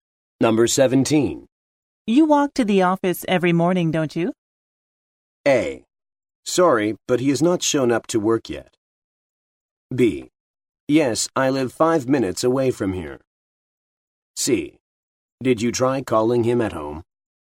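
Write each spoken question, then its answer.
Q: You walk to the office every morning, don't you?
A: B: Yes, I live 5 minutes away from here.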